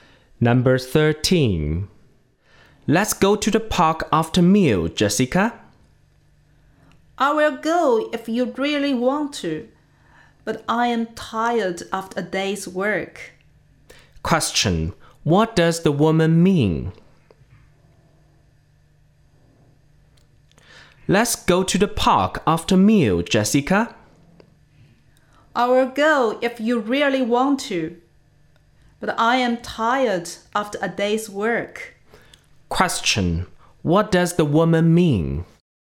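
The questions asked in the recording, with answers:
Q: what does the woman mean?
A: She is tired and doesn't really want to go, but will go if he insists.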